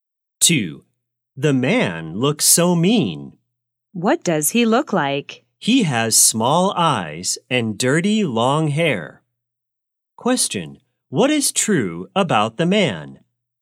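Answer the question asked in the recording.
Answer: He has small eyes and dirty long hair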